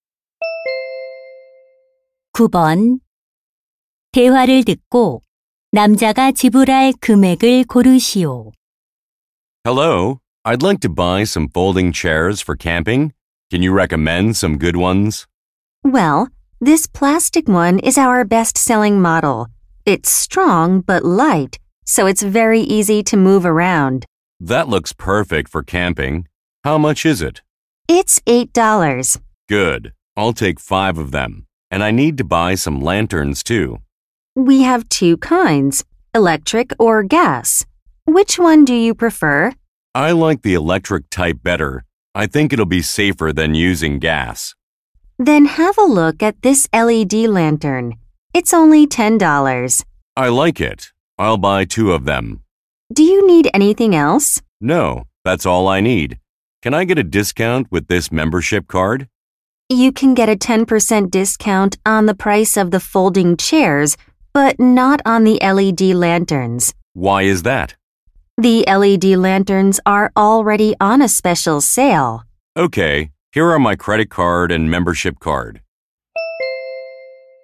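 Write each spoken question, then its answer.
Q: 대화를 듣고 남자가 지불할 금액을 고르시오.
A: $56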